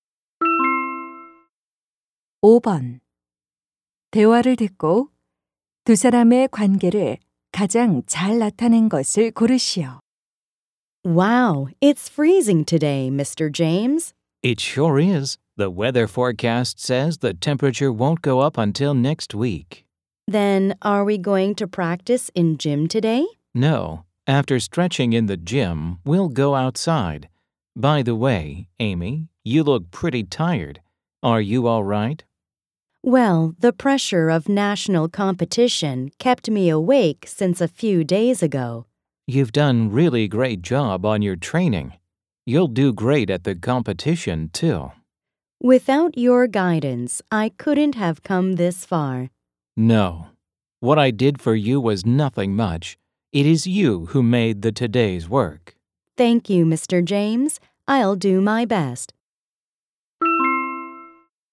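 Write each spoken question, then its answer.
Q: 대화를 듣고 두 사람의 관계를 가장 잘 나타낸 것을 고르시오.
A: 코치 - 선수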